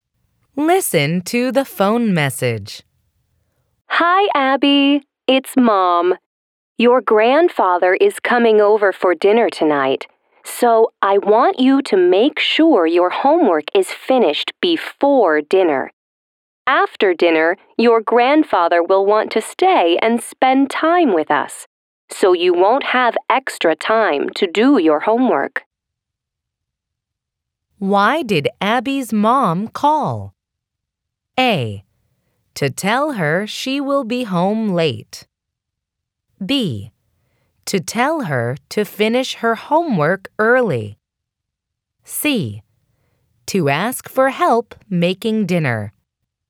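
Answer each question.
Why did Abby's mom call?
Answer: To tell her to finish her homework early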